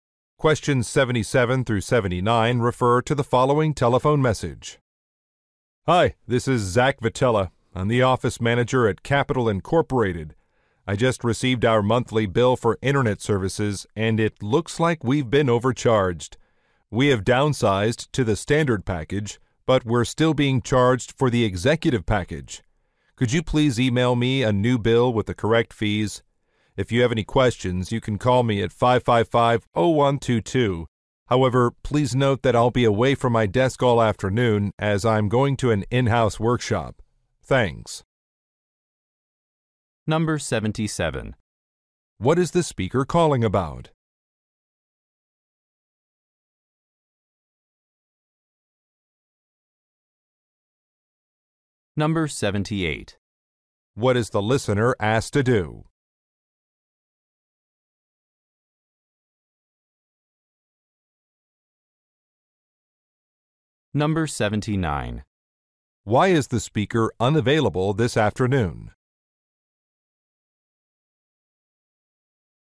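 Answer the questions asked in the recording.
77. An incorrect internet bill (overcharge)
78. Email a corrected bill
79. He is attending an in-house workshop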